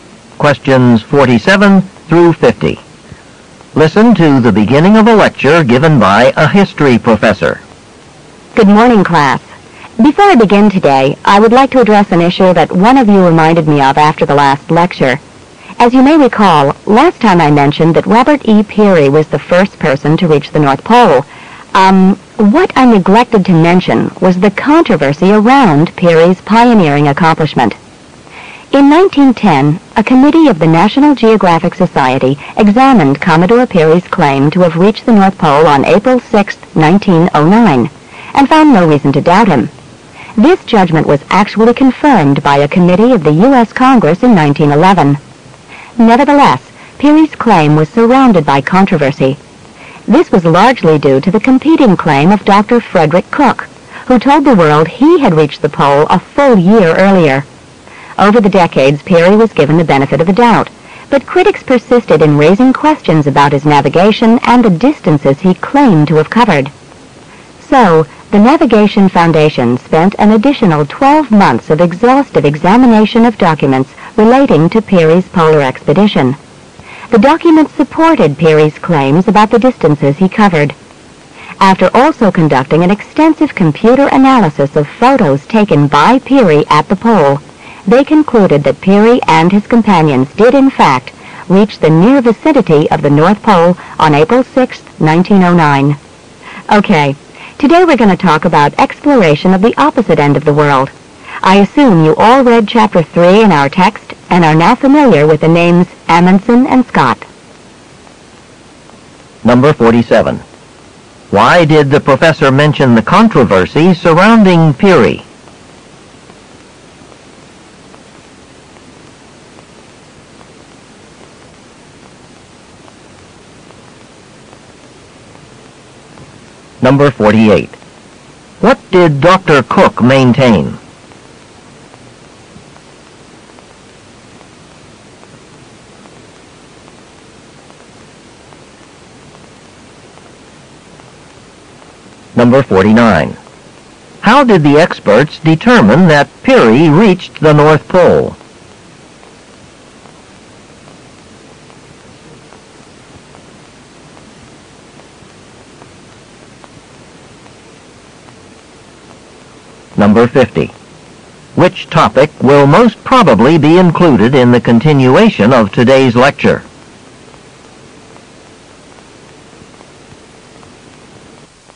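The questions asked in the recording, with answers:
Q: Why did the professor mention the controversy surrounding Peary?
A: He had neglected to mention it last lecture, and a student reminded him

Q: What did Dr. Cook maintain?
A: That he reached the North Pole a year before Peary

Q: How did the experts determine that Peary reached the North Pole?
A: By examining documents and analyzing his photos by computer

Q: Which topic will most probably be included in the continuation of today's lecture?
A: Exploration of the South Pole (Amundsen and Scott)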